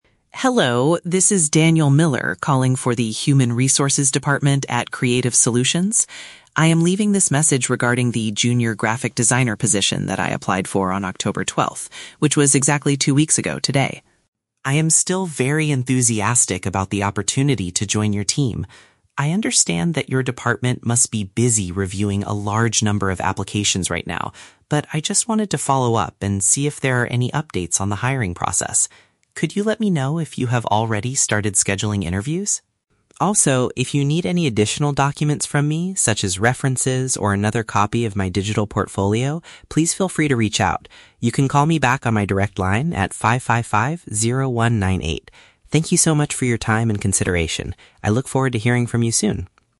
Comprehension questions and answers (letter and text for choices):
Listen to a voicemail from a job applicant and choose the correct answer (A, B, or C) for each question.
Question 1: Why is Daniel leaving this voicemail?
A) To formally accept the job offer for the Graphic Designer role.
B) To check the current status of his recent employment request.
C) To complain about waiting two weeks for a job interview.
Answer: B) To check the current status of his recent employment request.

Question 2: What does Daniel assume about the Human Resources department?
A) They are currently dealing with many other candidates.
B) They accidentally lost his original digital portfolio.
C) They have already hired someone else for the position.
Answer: A) They are currently dealing with many other candidates.

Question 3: What is Daniel willing to do if necessary?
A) Visit the company's main office in person on October 12th.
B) Call the HR department again later this week.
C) Provide extra materials to support his application.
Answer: C) Provide extra materials to support his application.

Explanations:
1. Daniel says he wants to "follow up and see if there are any updates on the hiring process". Option (B) correctly paraphrases this intent (check the current status = see if there are updates; employment request = application). Option (A) is The Trap: The role "Graphic Designer" is mentioned, but he has not received an offer yet. Option (C) is The Trap: He mentions "two weeks" and "interviews", but his tone is polite and understanding, not complaining.
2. Daniel says, "I understand that your department must be busy reviewing a large number of applications right now." Option (A) is a direct paraphrase of this assumption (dealing with many other candidates = reviewing a large number of applications). Option (B) is The Trap: He offers to send "another copy" of his portfolio just in case they need it, but he does not assume they lost it. Option (C) is a common fear for job seekers, but it is not mentioned in the audio.
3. Daniel states, "if you need any additional documents from me... please feel free to reach out." Option (C) perfectly paraphrases this offer (extra materials = additional documents). Option (A) is The Trap: "October 12th" is the date he originally applied, not a date he plans to visit the office. Option (B) is The Trap: He provides his phone number and asks them to call him back ("You can call me back"), rather than promising to call them again.

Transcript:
Daniel: Hello, this is Daniel Miller calling for the Human Resources department at Creative Solutions. I am leaving this message regarding the Junior Graphic Designer position that I applied for on October 12th, which was exactly two weeks ago today.
I am still very enthusiastic about the opportunity to join your team. I understand that your department must be busy reviewing a large number of applications right now, but I just wanted to follow up and see if there are any updates on the hiring process. Could you let me know if you have already started scheduling interviews?
Also, if you need any additional documents from me, such as references or another copy of my digital portfolio, please feel free to reach out. You can call me back on my direct line at 555-0198. Thank you so much for your time and consideration. I look forward to hearing from you soon.